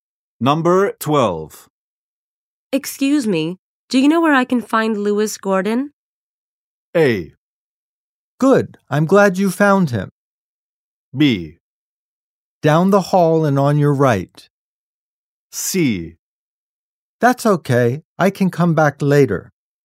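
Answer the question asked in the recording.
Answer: B: Down the hall and on your right.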